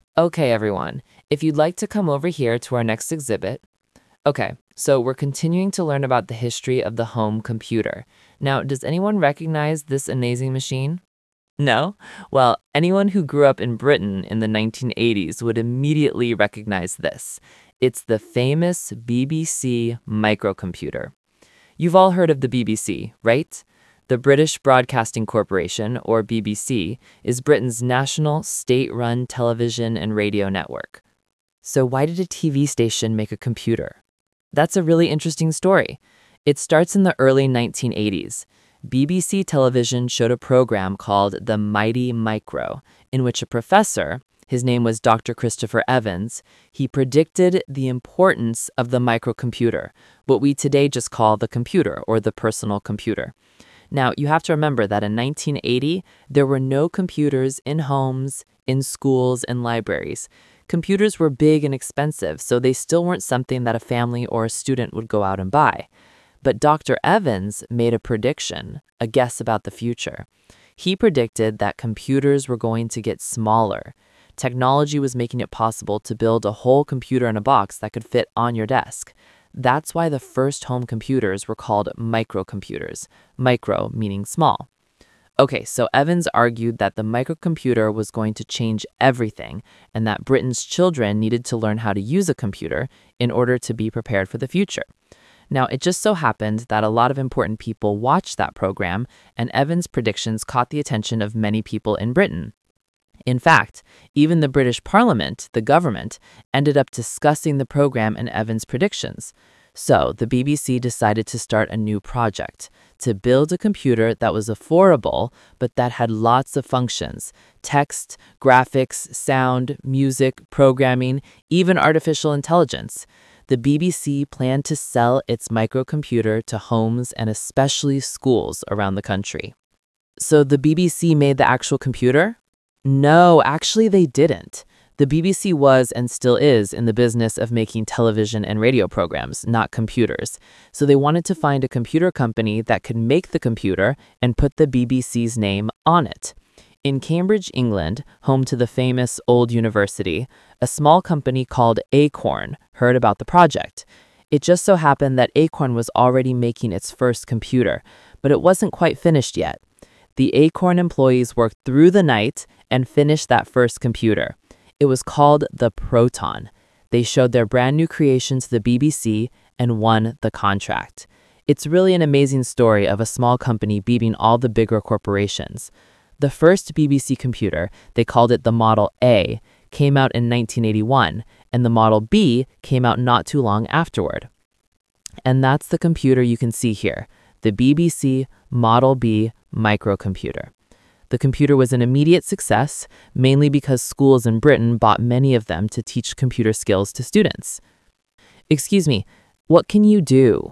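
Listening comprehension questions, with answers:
Talk/Lecture 3: Listen to a tour guide talking to some visitors at a museum about the BBC computer.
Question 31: Which is TRUE about the computers in 1980?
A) They were popular in schools and libraries only.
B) They were made with a size of a box.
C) They were too expensive.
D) They were used to solve math problems.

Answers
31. C) They were too expensive.

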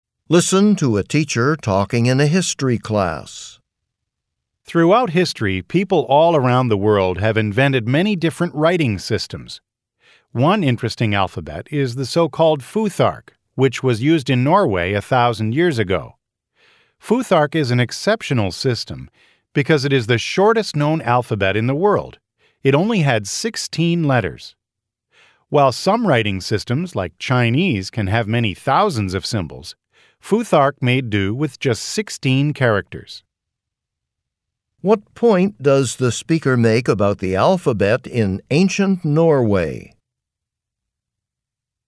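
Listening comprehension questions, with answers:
What point does the speaker make about the alphabet in ancient Norway?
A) It had very few letters.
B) It was quite difficult to learn.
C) It spread to other parts of the world.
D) It was similar to the Chinese writing system.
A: A) It had very few letters.

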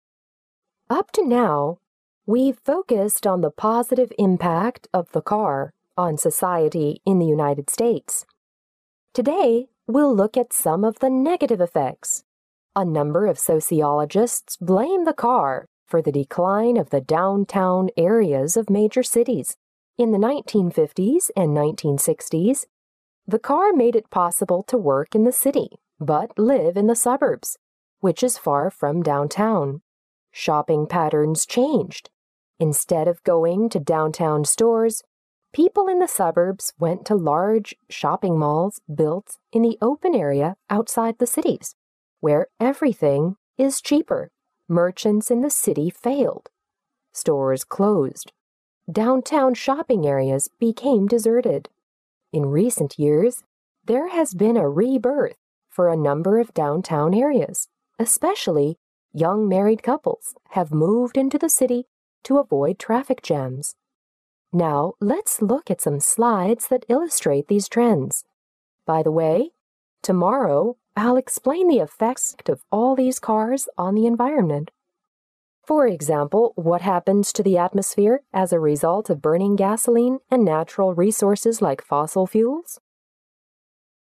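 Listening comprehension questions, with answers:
What did the speaker probably talk about before?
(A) How the car was invented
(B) The losses caused by traffic accidents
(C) Advances in car designs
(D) The benefits of cars to society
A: (D) The benefits of cars to society

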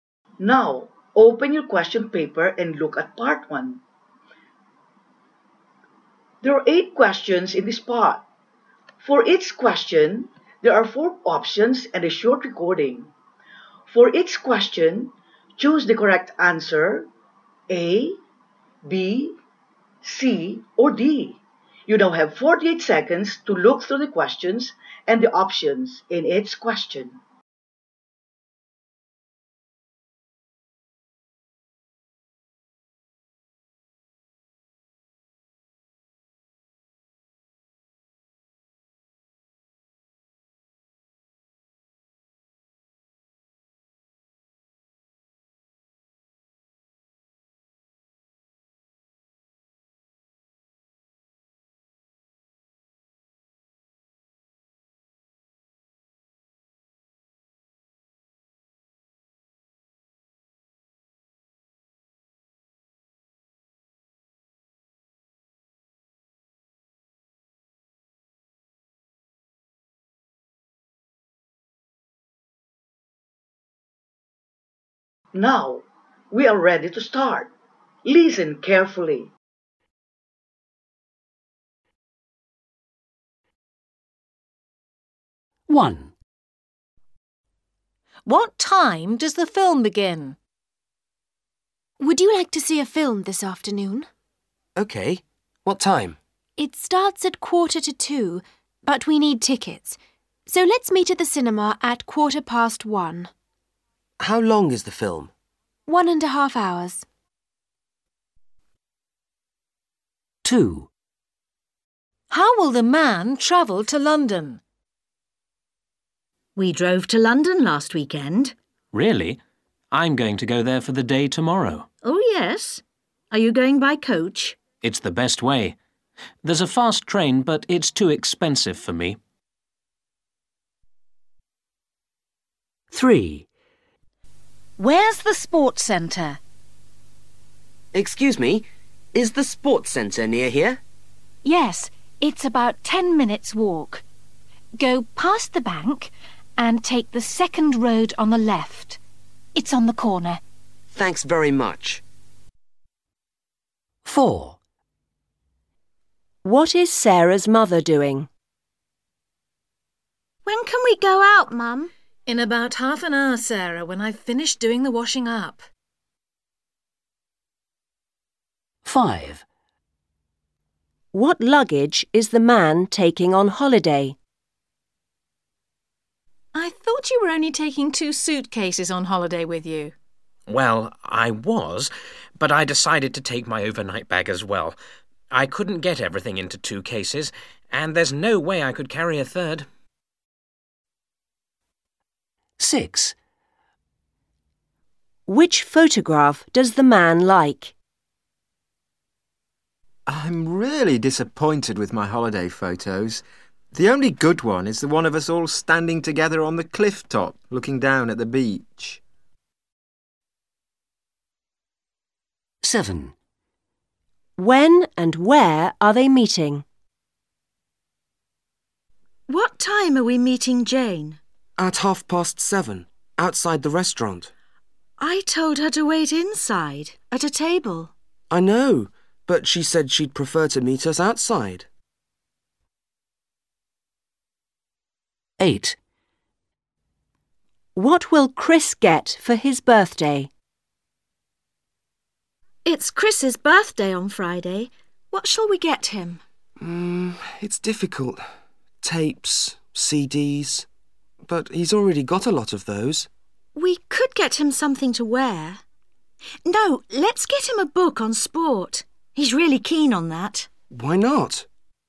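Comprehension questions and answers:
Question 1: What time does the film begin?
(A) at quarter past one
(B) at half past one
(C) at quarter to two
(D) at quarter to one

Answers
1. (C) at quarter to two

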